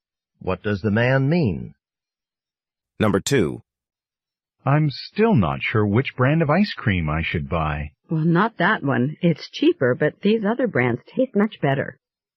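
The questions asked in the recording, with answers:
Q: What does the woman imply the man should do?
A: Buy one of the better-tasting brands, even though it costs more.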